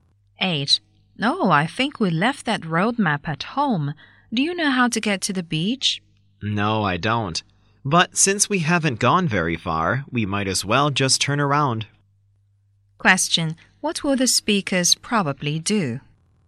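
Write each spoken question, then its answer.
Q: What will the speakers probably do?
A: Go back home to get the roadmap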